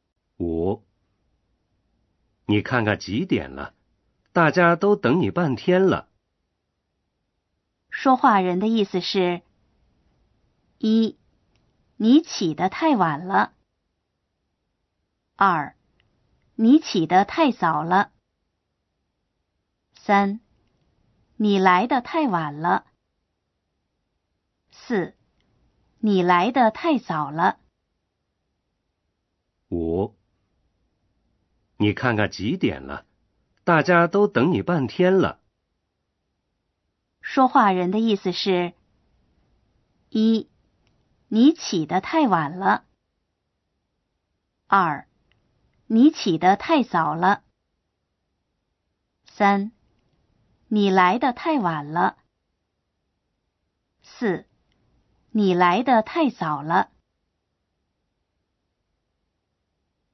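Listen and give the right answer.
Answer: 三: 你来得太晚了。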